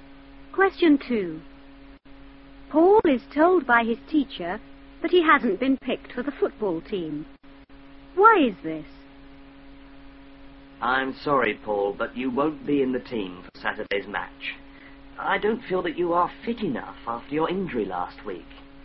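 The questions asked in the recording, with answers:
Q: Why is this?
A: He is not fit enough after his injury last week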